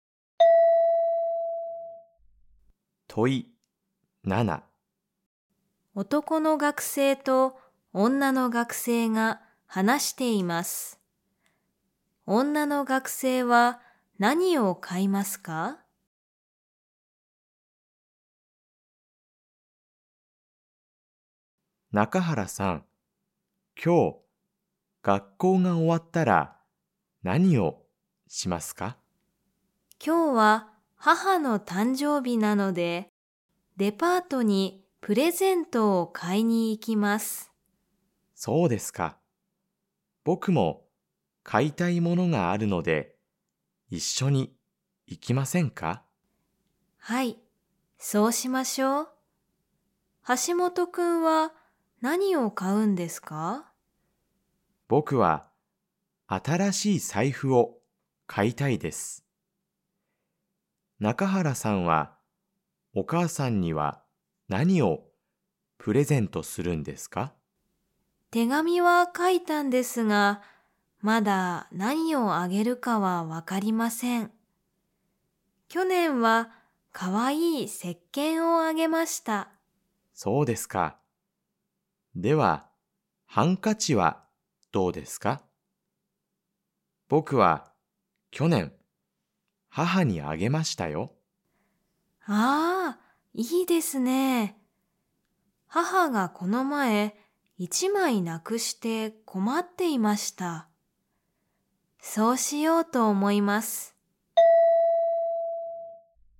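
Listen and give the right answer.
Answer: ハンカチ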